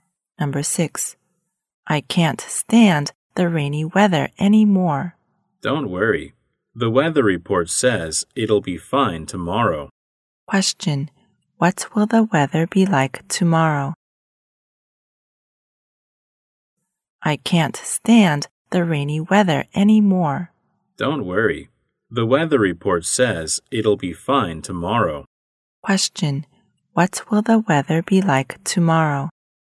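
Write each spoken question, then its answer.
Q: Question,What will the weather be like tomorrow?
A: Fine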